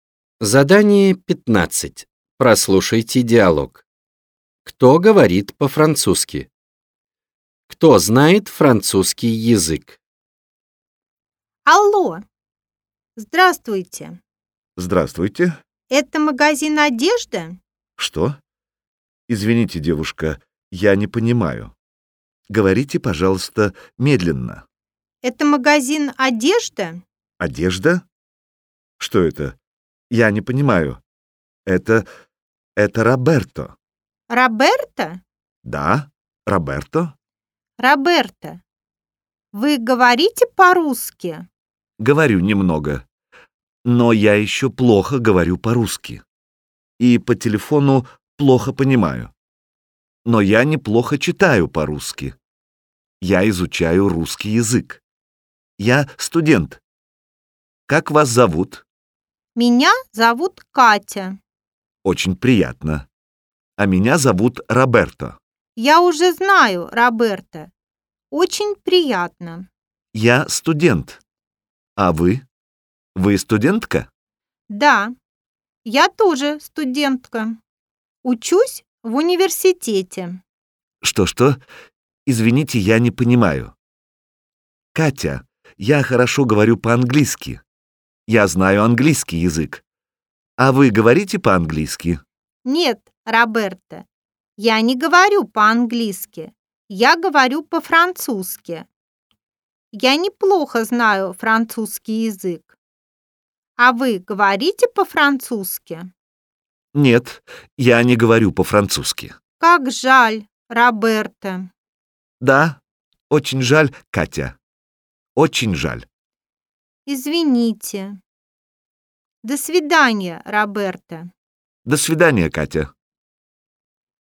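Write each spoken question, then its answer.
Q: Кто говорит по-французски?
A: Катя

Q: Кто знает французский язык?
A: Катя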